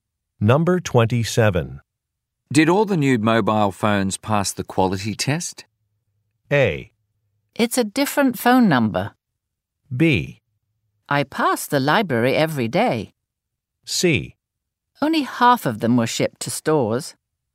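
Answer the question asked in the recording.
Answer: C: Only half of them were shipped to stores.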